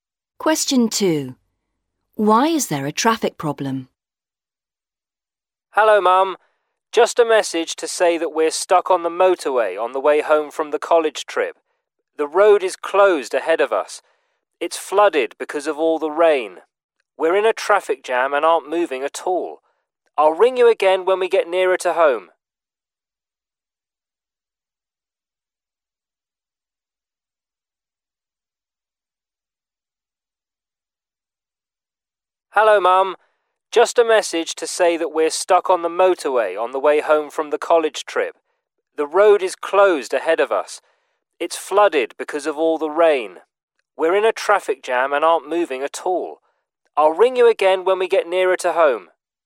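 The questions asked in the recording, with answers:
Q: Why is there a traffic problem?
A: The road is flooded because of all the rain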